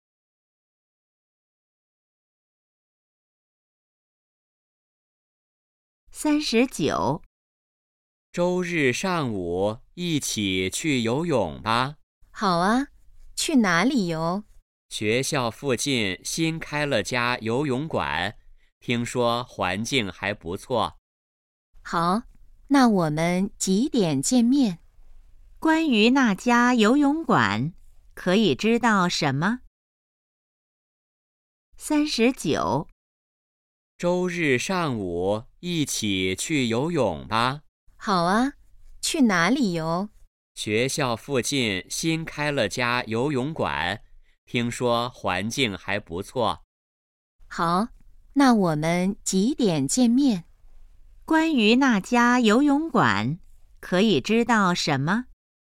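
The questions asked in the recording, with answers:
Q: 关于那家游泳馆,可以知道什么?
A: 新开的,在学校附近,环境不错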